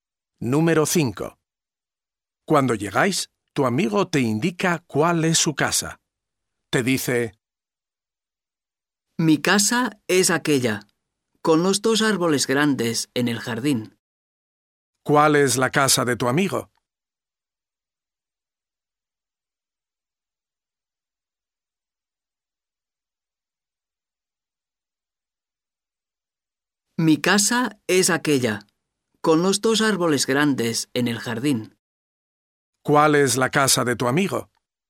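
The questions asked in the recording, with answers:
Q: ¿Cuál es la casa de tu amigo?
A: La casa con los dos árboles grandes en el jardín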